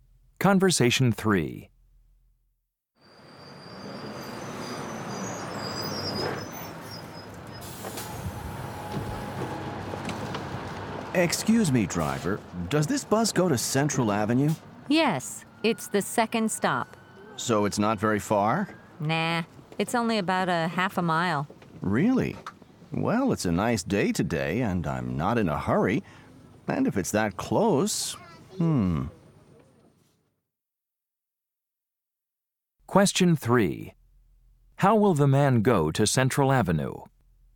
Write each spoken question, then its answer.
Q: How will the man go to Central Avenue?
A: I'll just walk to Central Avenue.